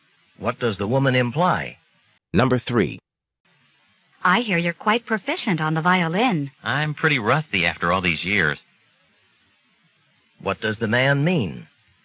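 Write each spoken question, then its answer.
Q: What does the man mean?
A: He has not played the violin for a long time and is out of practice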